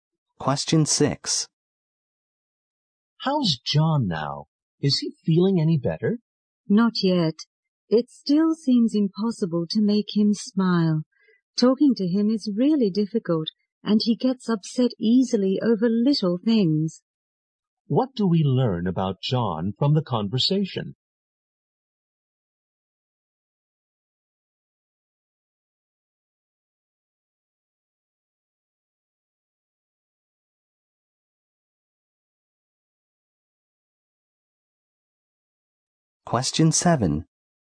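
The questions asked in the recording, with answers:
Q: What do we learn about John from the conversation?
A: He is still depressed and easily upset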